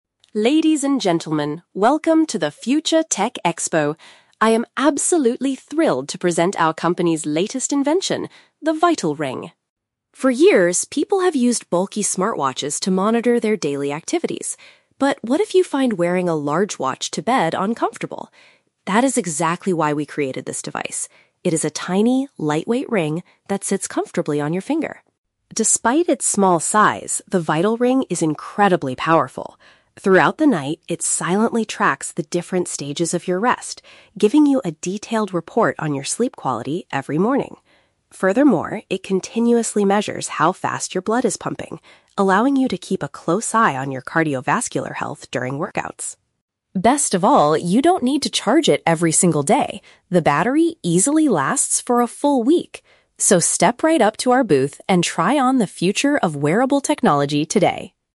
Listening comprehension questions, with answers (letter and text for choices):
Listen to a representative introducing a new product at a technology exhibition. For each question, choose the correct answer (A, B, or C).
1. According to the speaker, why was the VitalRing created?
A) Because traditional fitness watches are often too large to wear comfortably at night.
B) Because many people kept forgetting to put their smartwatches on in the morning.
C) Because doctors needed a cheaper device to check their patients' health.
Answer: A) Because traditional fitness watches are often too large to wear comfortably at night.

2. What is one of the main functions of this new device?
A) It gently wakes the user up at the best time every morning.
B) It accurately records the speed of the user's heartbeat.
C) It counts how many steps a person takes during an exercise session.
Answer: B) It accurately records the speed of the user's heartbeat.

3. What does the representative say about the device's battery?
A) It needs to be completely replaced at the end of the year.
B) It requires the user to plug it in every single day.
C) It can function for seven days without needing to be recharged.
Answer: C) It can function for seven days without needing to be recharged.

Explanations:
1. The MC says people used "bulky smartwatches" but might find wearing a large watch to bed "uncomfortable." Option (A) correctly paraphrases this ("traditional fitness watches" for "smartwatches", "too large" for "bulky"). Option (B) sounds like a common problem but is never mentioned. Option (C) is a trap; the device is for health, but doctors and prices are not discussed.
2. The speaker states that the ring "measures how fast your blood is pumping." Option (B) uses synonyms ("records the speed" for "measures how fast", "heartbeat" for "blood is pumping"). Option (A) is a trap; it gives a report every morning, but it doesn't wake the user up (no alarm feature mentioned). Option (C) is a trap; "workouts" are mentioned, but it tracks cardiovascular health, not steps.
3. The representative announces that "The battery easily lasts for a full week!" Option (C) translates "a full week" to "seven days." Option (A) is not mentioned in the audio. Option (B) is the exact opposite of what the speaker says ("you don't need to charge it every single day").

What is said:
MC: Ladies and gentlemen, welcome to the Future Tech Expo! I am absolutely thrilled to present our company's latest invention: the VitalRing.
For years, people have used bulky smartwatches to monitor their daily activities. But what if you find wearing a large watch to bed uncomfortable? That is exactly why we created this device. It is a tiny, lightweight ring that sits comfortably on your finger.
Despite its small size, the VitalRing is incredibly powerful. Throughout the night, it silently tracks the different stages of your rest, giving you a detailed report on your sleep quality every morning. Furthermore, it continuously measures how fast your blood is pumping, allowing you to keep a close eye on your cardiovascular health during workouts.
Best of all, you don't need to charge it every single day. The battery easily lasts for a full week!